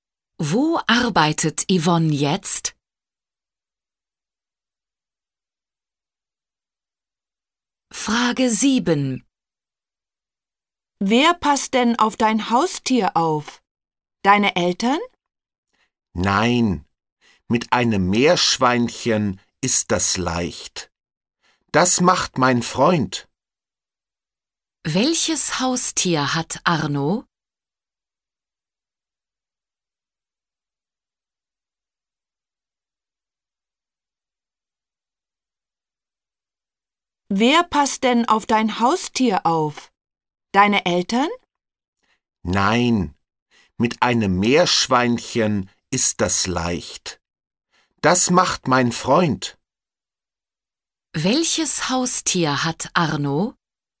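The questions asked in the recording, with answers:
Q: Welches Haustier hat Arno?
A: Ein Meerschweinchen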